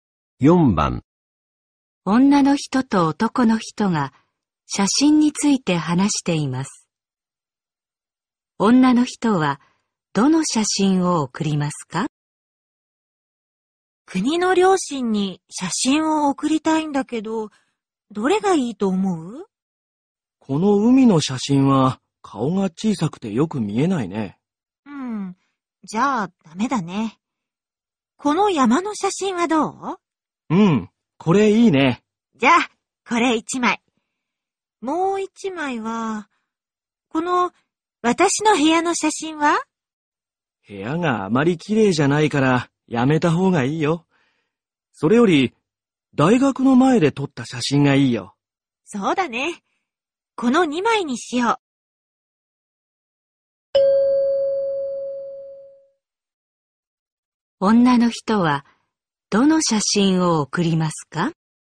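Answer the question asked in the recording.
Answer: 山の写真と大学の前で撮った写真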